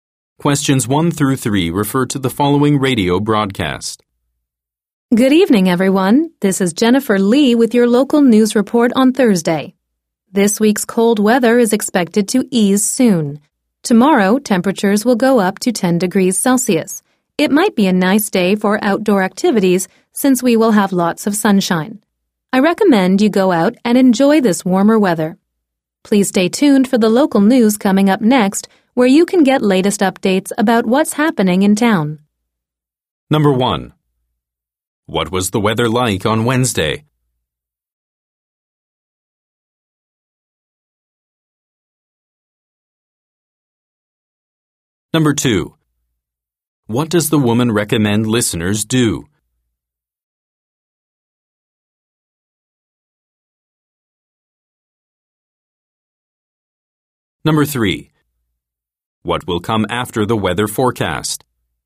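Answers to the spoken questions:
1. It was cold.
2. Go out and enjoy the warmer weather.
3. The local news.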